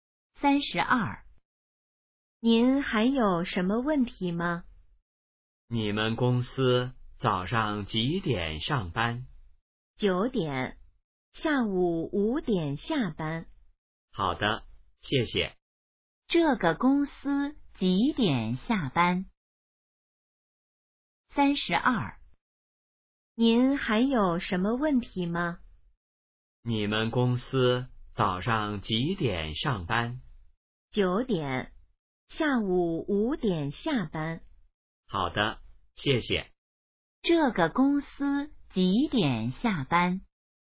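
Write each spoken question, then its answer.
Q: 这个公司几点下班?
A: 下午5点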